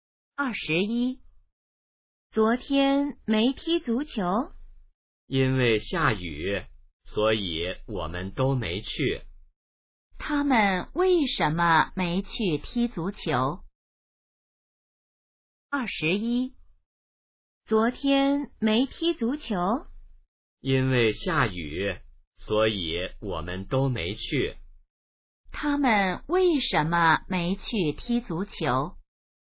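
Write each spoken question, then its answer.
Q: 他们为什么没去踢足球?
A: 因为下雨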